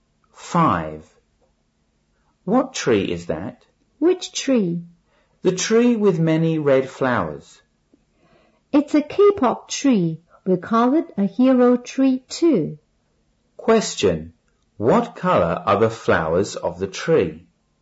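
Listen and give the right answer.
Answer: Red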